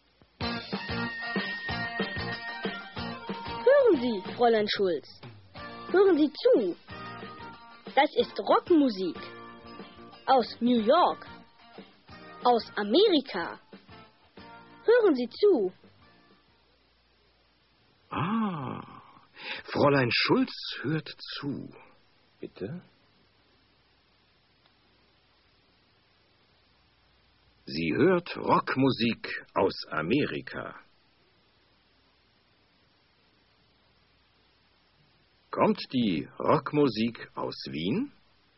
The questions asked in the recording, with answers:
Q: Kommt die Rockmusik aus Wien?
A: Nein, sie kommt nicht aus Wien.